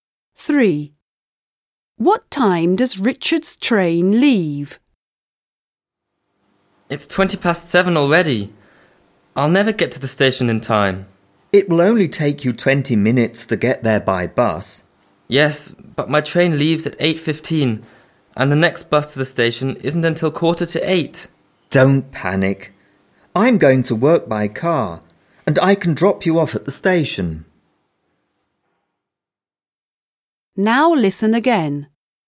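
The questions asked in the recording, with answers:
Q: What time does Richard's train leave?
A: 8:15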